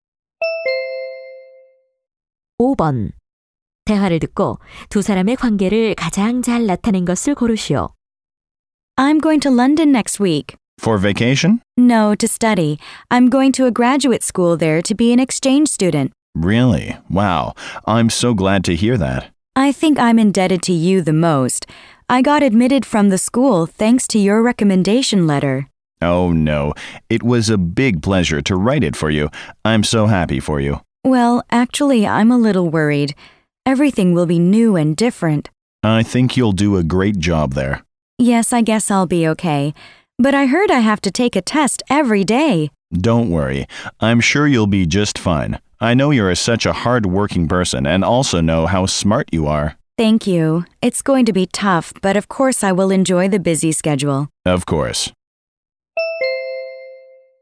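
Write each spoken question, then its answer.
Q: 대화를 듣고 두 사람의 관계를 가장 잘 나타낸 것을 고르시오.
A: 학생과 추천서를 써 준 교수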